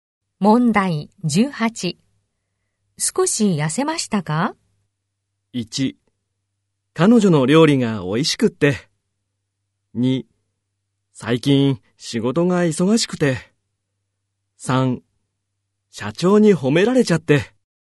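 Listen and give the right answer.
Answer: 2: 最近仕事が忙しくて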